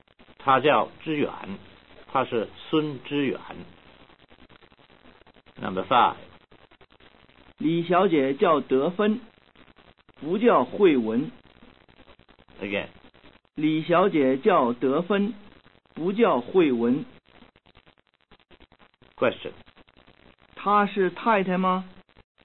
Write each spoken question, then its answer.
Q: 她是太太吗?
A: 她不是太太,她是小姐.